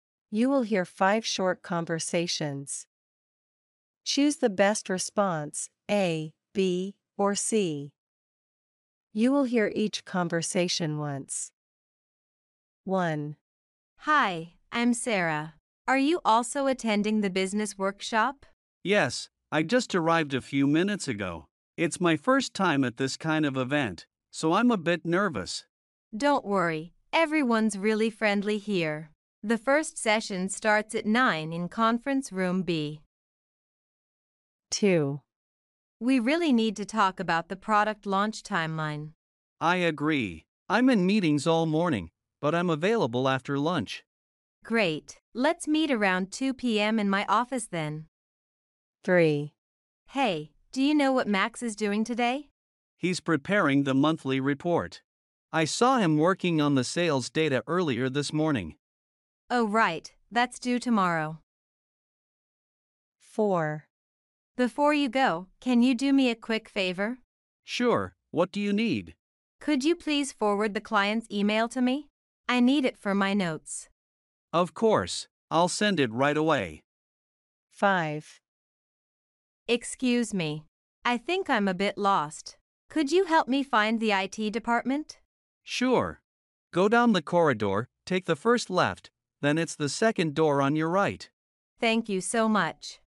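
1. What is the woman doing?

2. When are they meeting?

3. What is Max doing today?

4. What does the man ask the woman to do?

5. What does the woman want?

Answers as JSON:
{"1": "Attending a business workshop", "2": "Around 2 p.m., after lunch", "3": "Preparing the monthly report", "4": "Forward the client's email to him", "5": "To find the IT department"}

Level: A1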